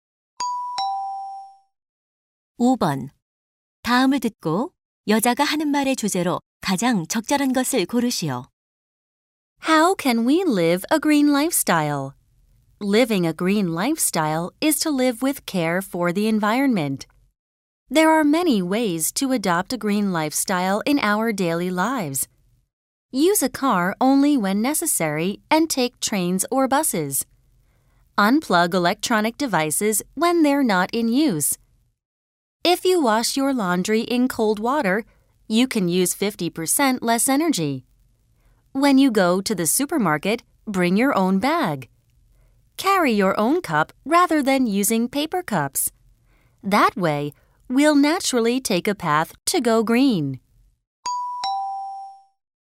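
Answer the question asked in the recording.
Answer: 일상생활에서 친환경적으로 사는 방법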